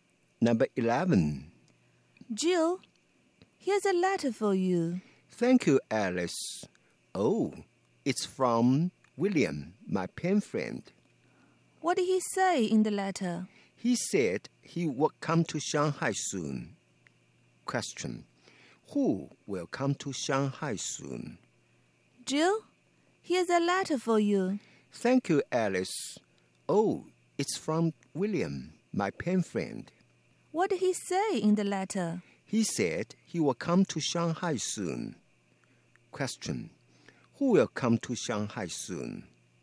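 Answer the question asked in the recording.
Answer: William, Jill's pen friend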